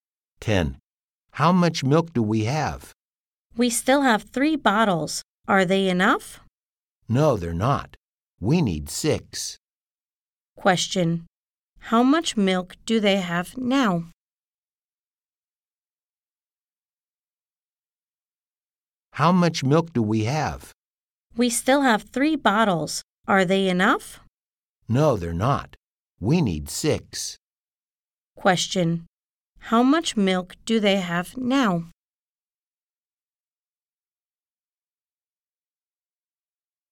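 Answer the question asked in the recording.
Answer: Three bottles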